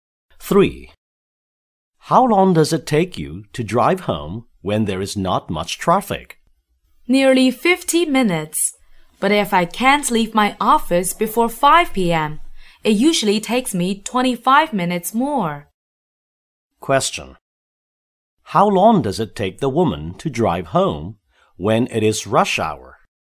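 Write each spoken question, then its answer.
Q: How long does it take the woman to drive home when it is rush hour?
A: 75 minutes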